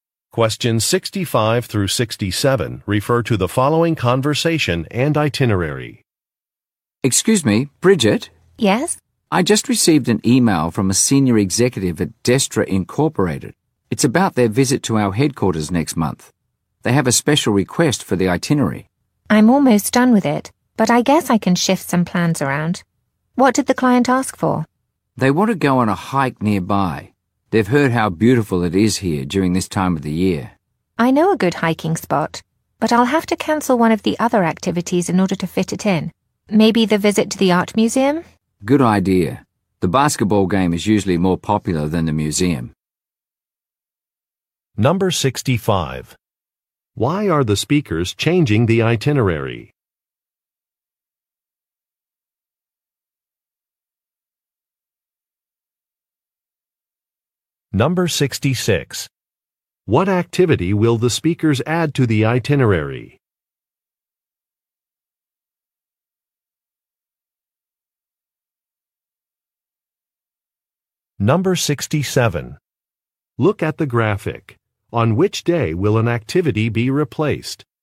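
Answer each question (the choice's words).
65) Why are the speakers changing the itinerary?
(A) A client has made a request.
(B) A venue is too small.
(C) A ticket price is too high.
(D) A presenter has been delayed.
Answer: A client has made a request.

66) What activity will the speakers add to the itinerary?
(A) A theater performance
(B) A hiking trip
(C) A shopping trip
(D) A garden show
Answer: A hiking trip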